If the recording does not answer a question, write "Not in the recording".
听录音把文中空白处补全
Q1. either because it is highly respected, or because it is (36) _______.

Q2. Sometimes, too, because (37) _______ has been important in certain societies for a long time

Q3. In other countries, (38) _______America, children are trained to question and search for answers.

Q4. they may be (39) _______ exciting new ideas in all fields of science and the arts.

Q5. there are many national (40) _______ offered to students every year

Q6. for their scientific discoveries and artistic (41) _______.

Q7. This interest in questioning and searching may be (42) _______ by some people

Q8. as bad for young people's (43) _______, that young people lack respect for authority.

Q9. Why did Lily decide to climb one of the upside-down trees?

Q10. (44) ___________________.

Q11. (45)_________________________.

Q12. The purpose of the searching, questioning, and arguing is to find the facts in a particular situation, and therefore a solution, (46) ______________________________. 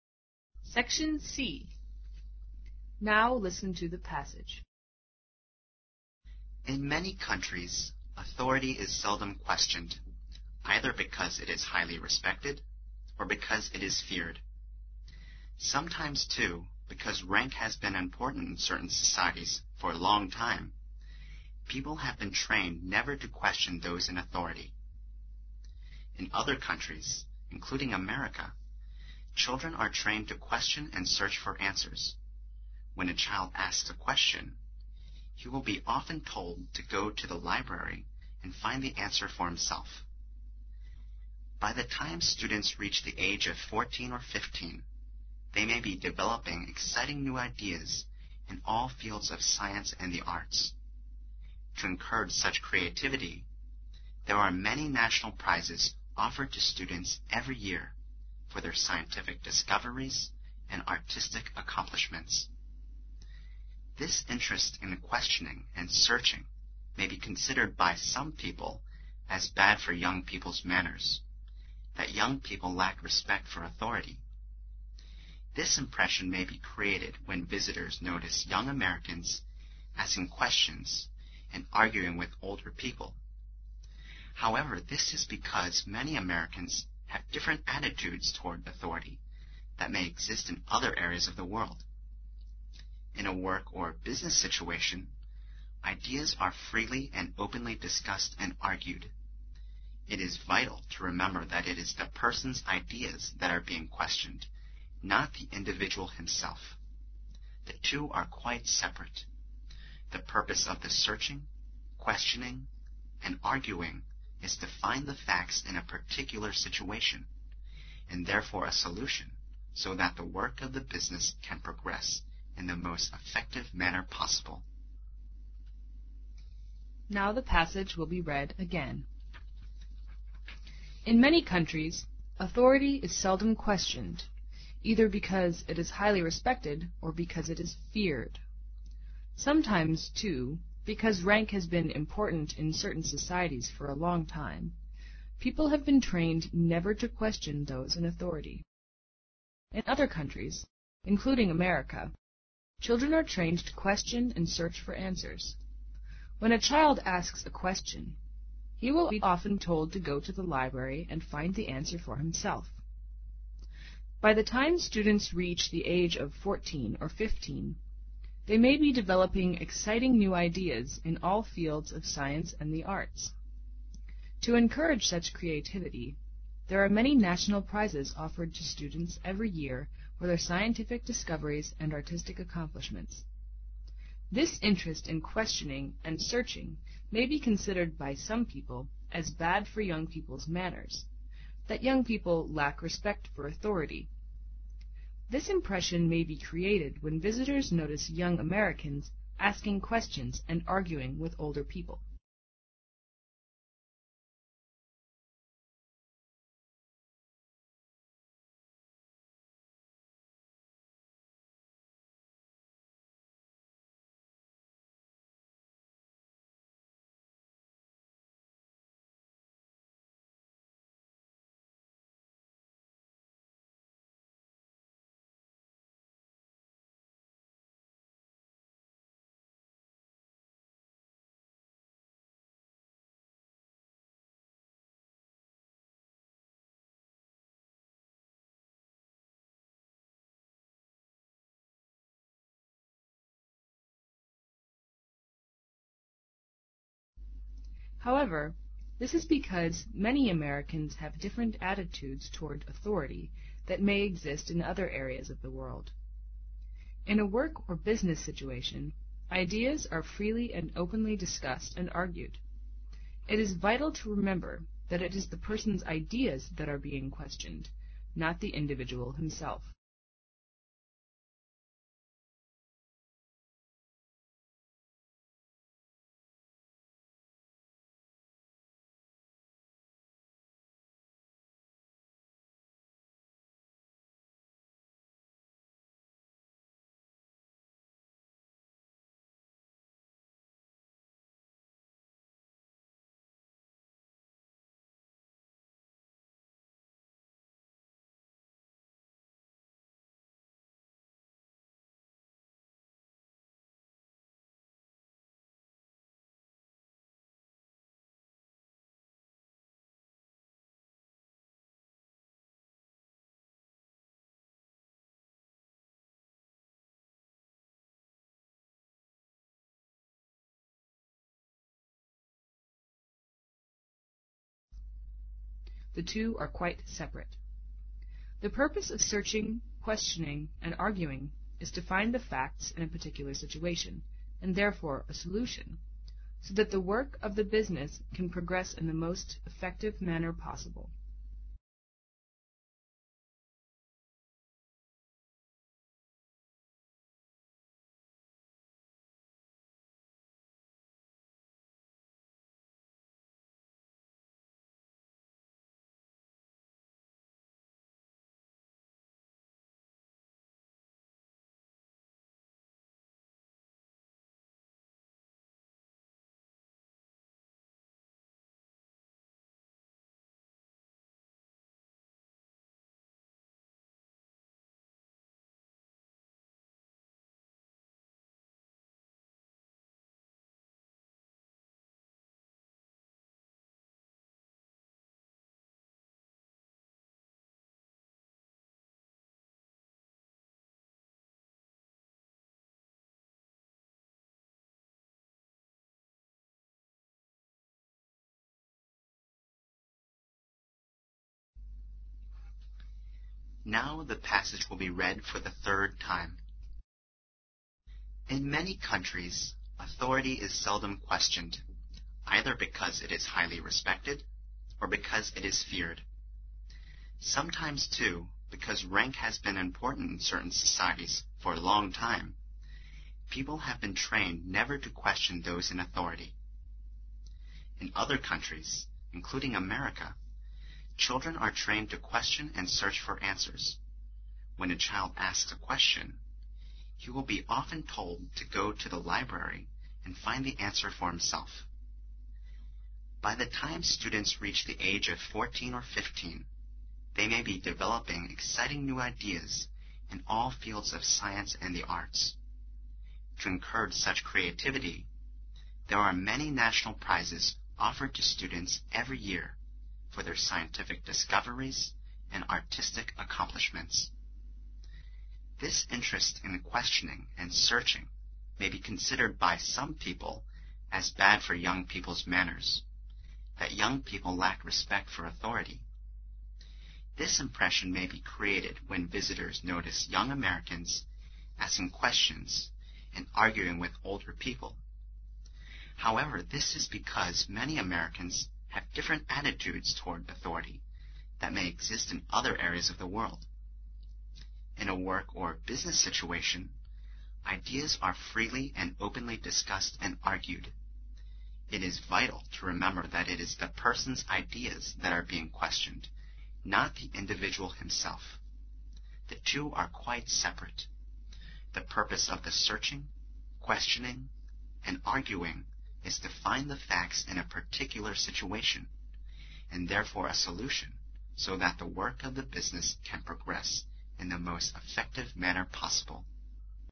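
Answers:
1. feared
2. rank
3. including
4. developing
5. prizes
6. accomplishments
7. considered
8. manners
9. Not in the recording
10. This impression may be created when visitors notice young Americans asking questions and arguing with older people.
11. It is vital to remember that it is the person's ideas that are being questioned, not the individual himself.
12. so that the work of the business can progress in the most effective manner possible

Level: 英语四级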